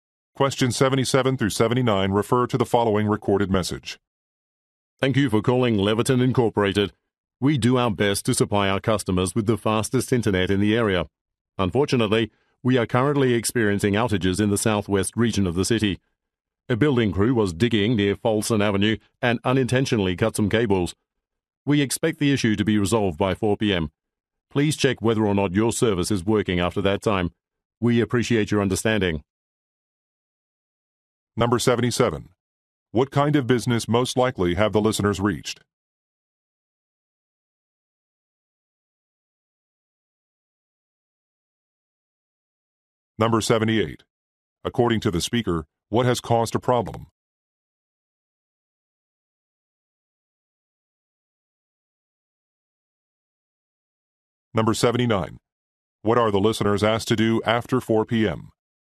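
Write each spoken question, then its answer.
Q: What kind of business most likely have the listeners reached?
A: An internet service provider

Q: According to the speaker, what has caused a problem?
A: A building crew accidentally cut some cables

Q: What are the listeners asked to do after 4 p.m.?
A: Check whether their service is working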